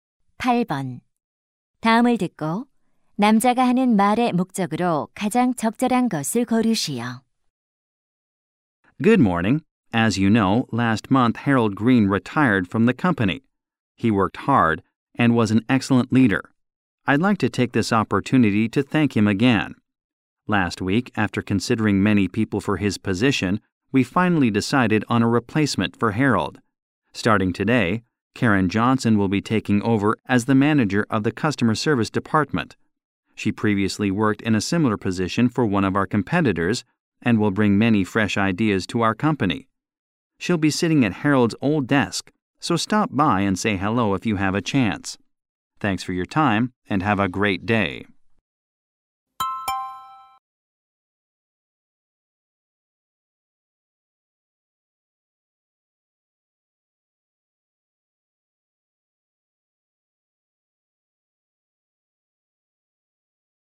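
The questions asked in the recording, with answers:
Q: 다음을 듣고 남자가 하는 말의 목적으로 가장 적절한 것을 고르시오.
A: 새 고객 서비스 부서장을 소개하려고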